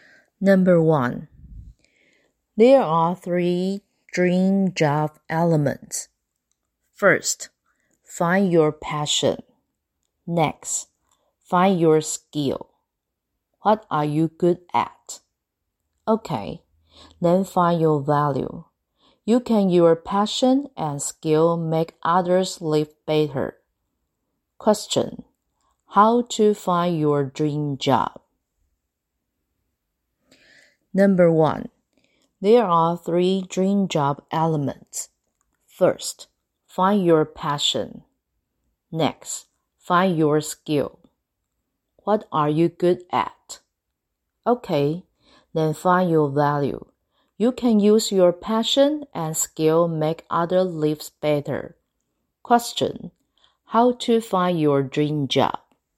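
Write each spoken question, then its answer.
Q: Question, how to find your dream job?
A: Find your passion, your skill, and your value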